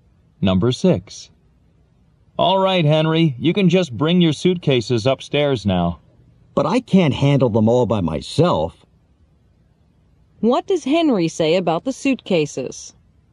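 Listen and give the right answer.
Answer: He can't carry them all alone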